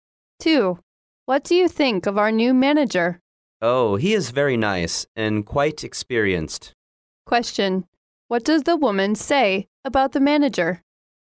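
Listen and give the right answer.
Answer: He is very nice and quite experienced.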